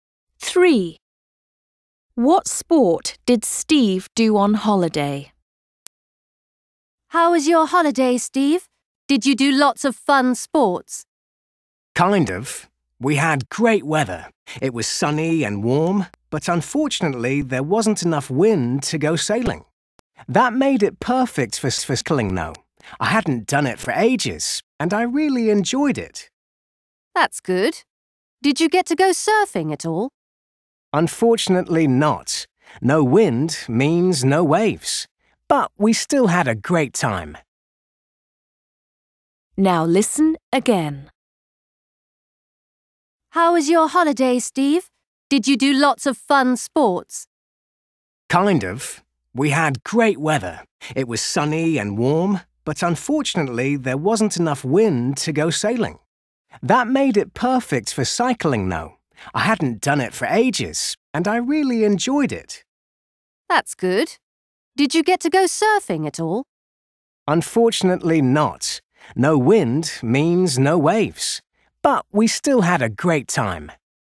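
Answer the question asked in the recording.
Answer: Cycling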